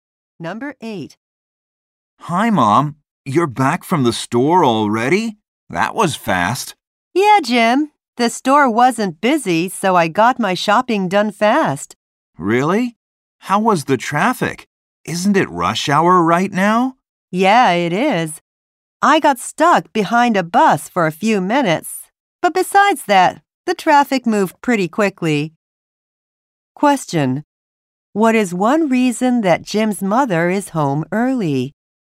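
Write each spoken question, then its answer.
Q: What is one reason that Jim's mother is home early?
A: The store wasn't busy.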